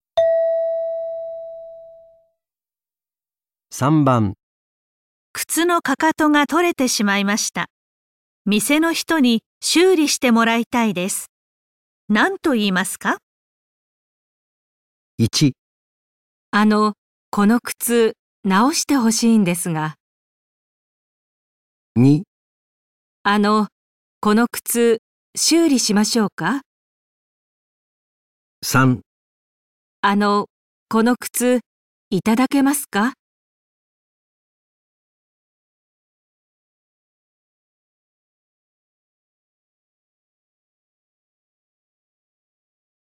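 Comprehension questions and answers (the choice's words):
問題4 では、絵を見ながら質問を聞いてください。やじるし(→)の人は何とか言いますか。1から3の中から、最もよいものを一つ選んでください。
靴の踵が取れてしまいました。店の人に修理してもらいたいです。何と言いますか。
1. あの、この靴、直して欲しいんですが。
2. あの、この靴、修理しましょうか。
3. あの、この靴、いただけますか。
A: あの、この靴、直して欲しいんですが。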